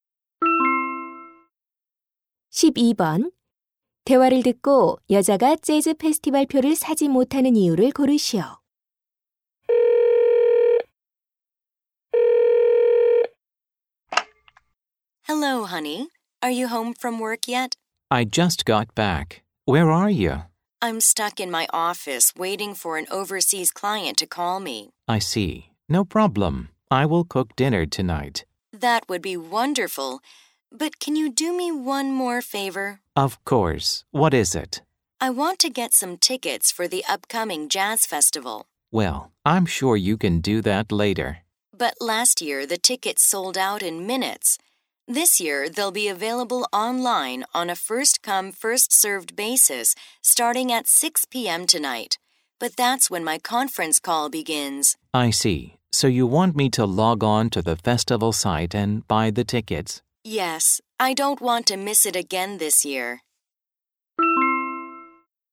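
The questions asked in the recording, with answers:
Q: 대화를 듣고 여자가 재즈 페스티벌 표를 사지 못하는 이유를 고르시오.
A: 표 판매 시작 시간에 전화 회의가 있어서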